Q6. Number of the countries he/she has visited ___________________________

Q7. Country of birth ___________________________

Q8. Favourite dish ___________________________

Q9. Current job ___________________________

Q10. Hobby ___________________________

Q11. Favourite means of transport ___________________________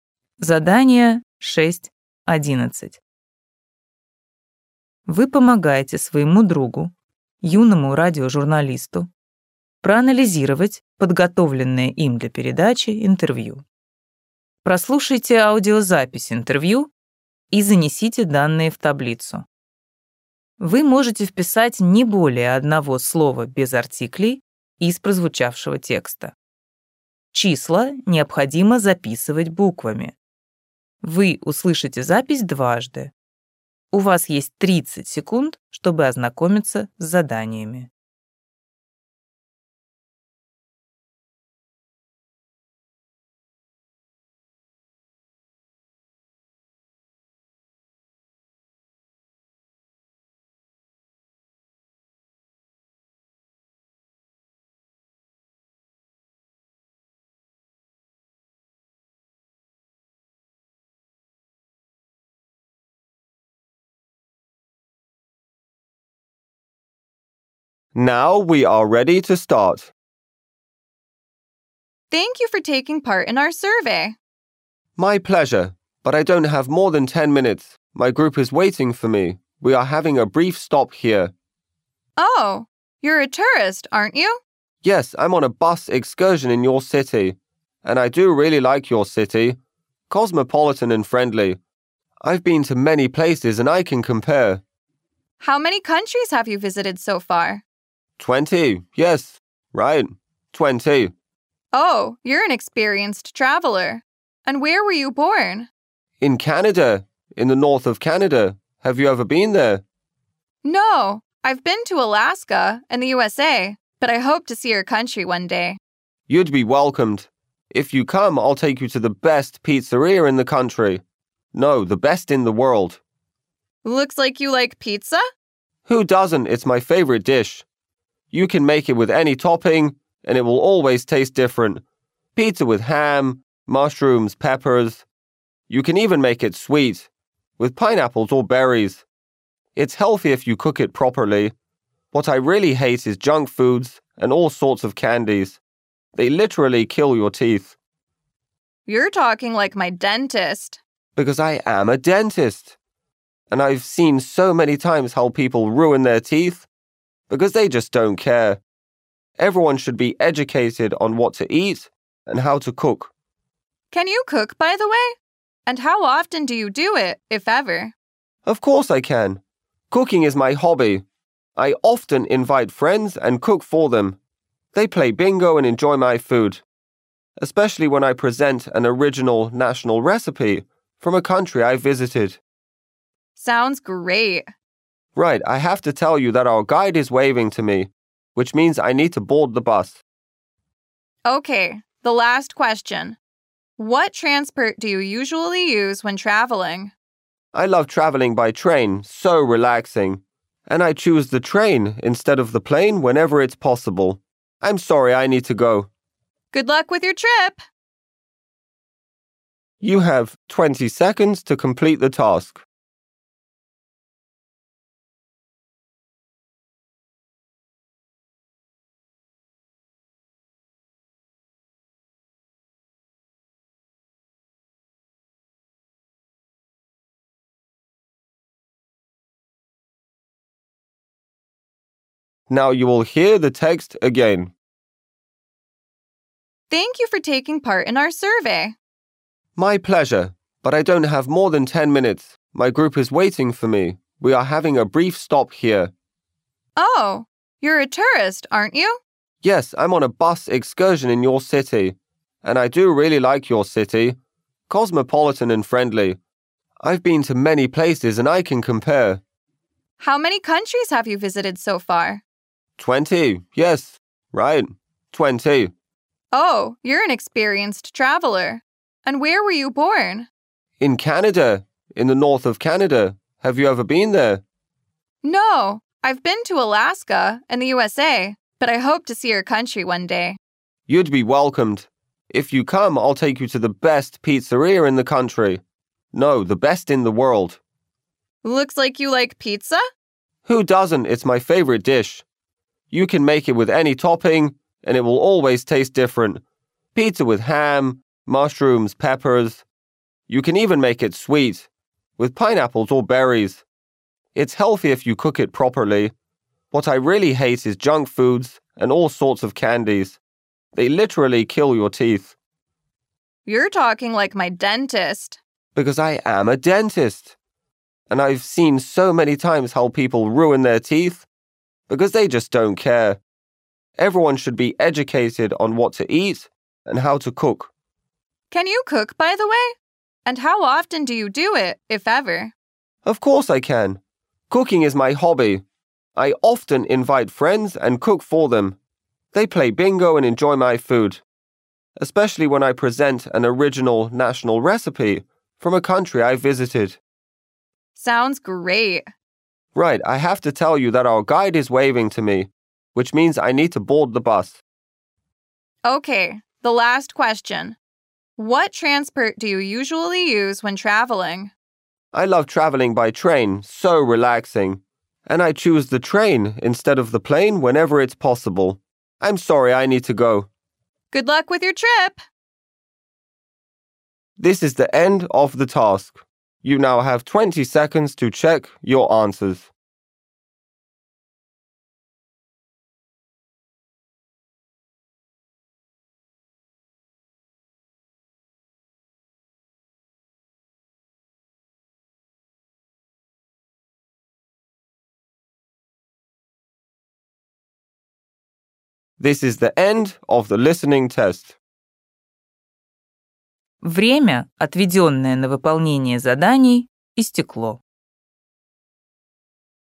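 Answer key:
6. twenty
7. Canada
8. pizza
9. dentist
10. cooking
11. train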